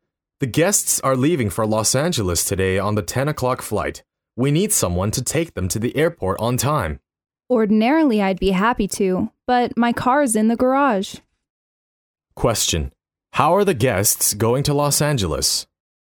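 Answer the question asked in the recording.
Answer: By plane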